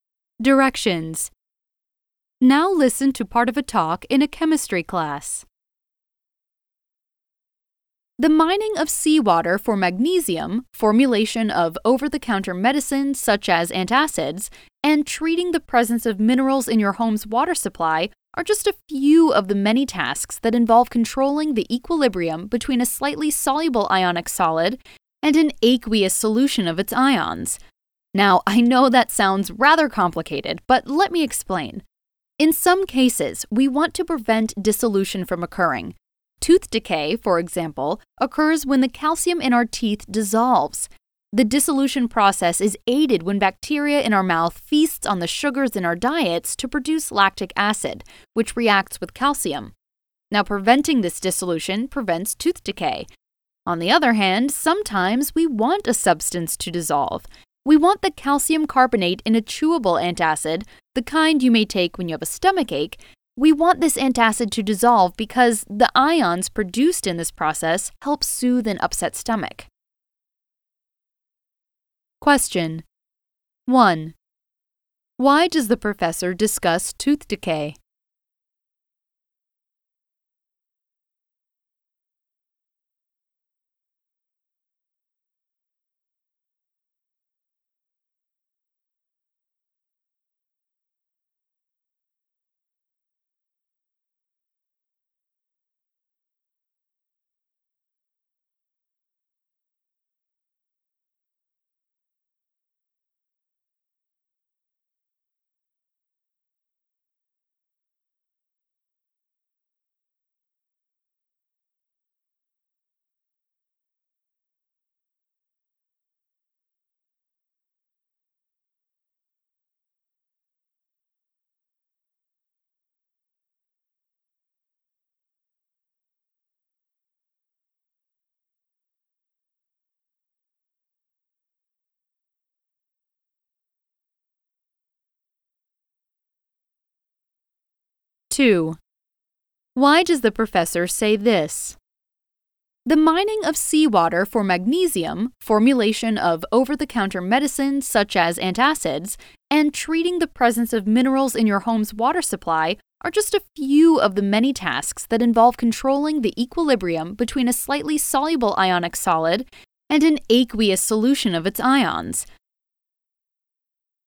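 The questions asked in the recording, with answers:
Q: Why does the professor discuss tooth decay?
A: As an example of a case where we want to prevent dissolution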